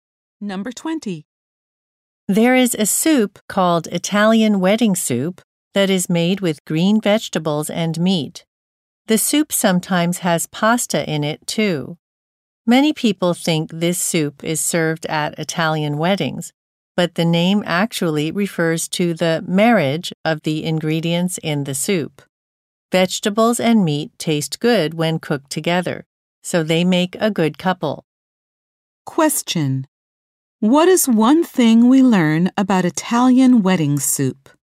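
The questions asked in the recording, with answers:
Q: What is one thing we learn about Italian wedding soup?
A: Its name refers to the marriage of its ingredients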